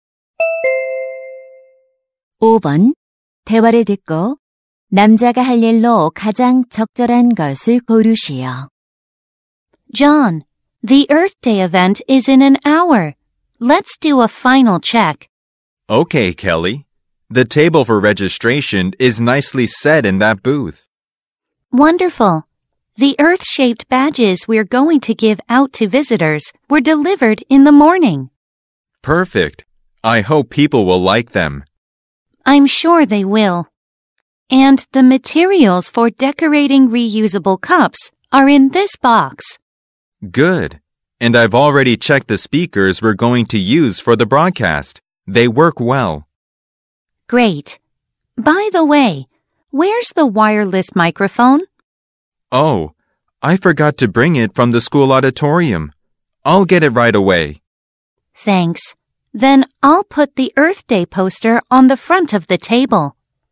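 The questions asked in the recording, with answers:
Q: 대화를 듣고 남자가 할 일로 가장 적절한 것을 고르시오.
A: 무선 마이크 가져오기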